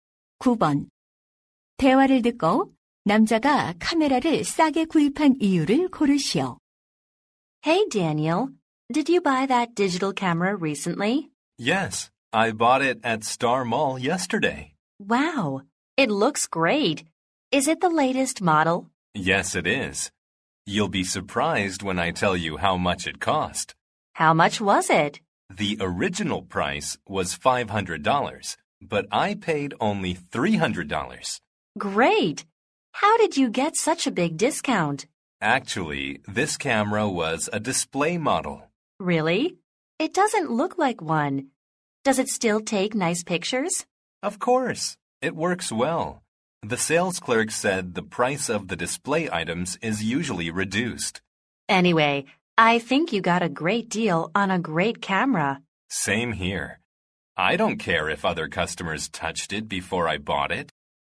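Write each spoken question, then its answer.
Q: 대화를 듣고 남자가 카메라를 싸게 구입한 이유를 고르시오.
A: 진열 상품이어서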